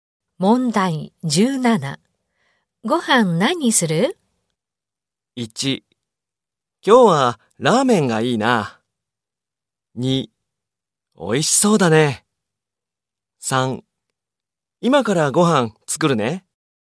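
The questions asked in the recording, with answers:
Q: ご飯何する?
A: 1: 今日はラーメンがいいな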